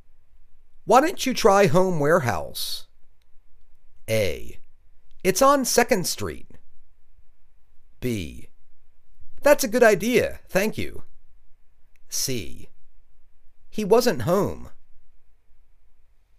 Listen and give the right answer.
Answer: That's a good idea. Thank you.